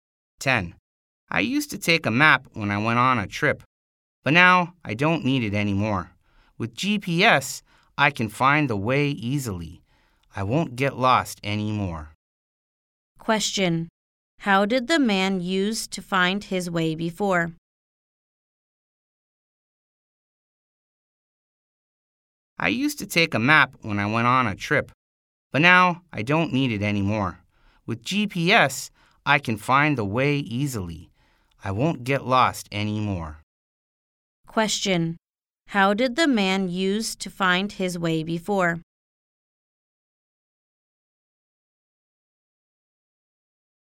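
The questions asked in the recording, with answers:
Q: Question. How did the man use to find his way before?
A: He used a map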